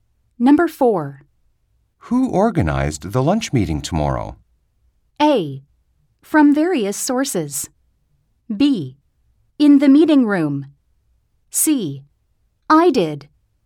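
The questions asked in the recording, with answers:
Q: Who organized the lunch meeting tomorrow?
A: C: I did.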